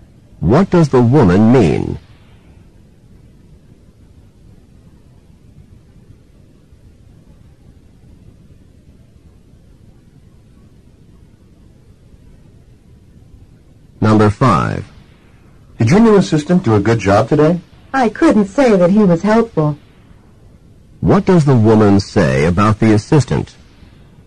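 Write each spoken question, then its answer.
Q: What does the woman say about the assistant?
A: He wasn't helpful.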